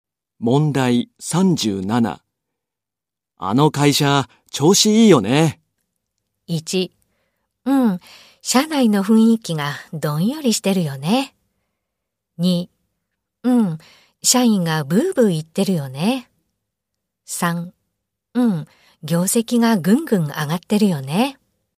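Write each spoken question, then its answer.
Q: あの会社、調子いいよね。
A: 3: 業績がぐんぐん上がってるよね。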